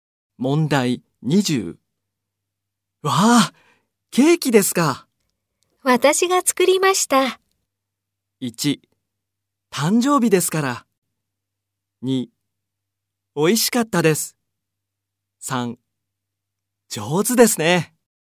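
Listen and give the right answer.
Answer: 3: 上手ですね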